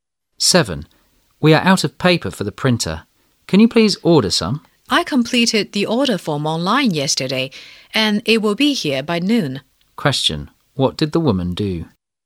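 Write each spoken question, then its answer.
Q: What did the woman do?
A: She ordered printer paper online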